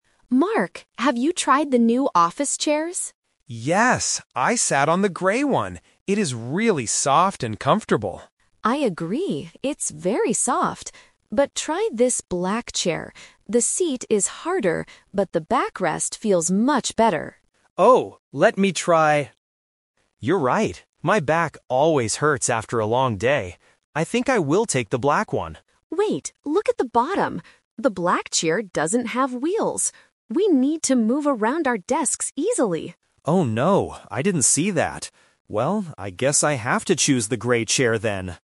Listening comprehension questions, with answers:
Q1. What is good about the grey chair?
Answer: It is very soft.

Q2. Why does Mark like the black chair at first?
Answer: The backrest feels good.

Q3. Which chair does Mark decide to take?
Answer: The grey chair, because the black one has no wheels.

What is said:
Rachel: Mark, have you tried the new office chairs?
Mark: Yes! I sat on the grey one. It is really soft and comfortable.
Rachel: I agree, it's very soft. But try this black chair. The seat is harder, but the backrest feels much better.
Mark: Oh, let me try... You're right. My back always hurts after a long day. I think I will take the black one.
Rachel: Wait, look at the bottom. The black chair doesn't have wheels! We need to move around our desks easily.
Mark: Oh no, I didn't see that. Well, I guess I have to choose the grey chair then.